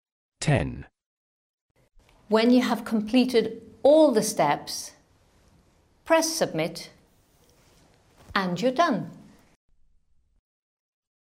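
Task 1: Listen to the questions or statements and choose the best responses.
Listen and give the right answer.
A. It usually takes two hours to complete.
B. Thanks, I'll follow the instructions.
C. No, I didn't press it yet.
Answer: B. Thanks, I'll follow the instructions.

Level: A2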